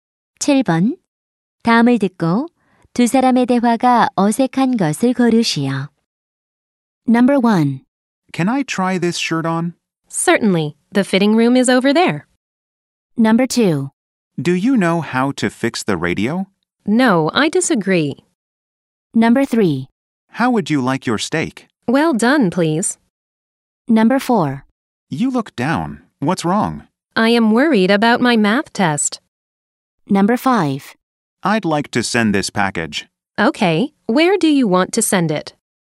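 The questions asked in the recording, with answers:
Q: 다음을 듣고 두 사람의 대화가 어색한 것을 고르시오.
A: 2번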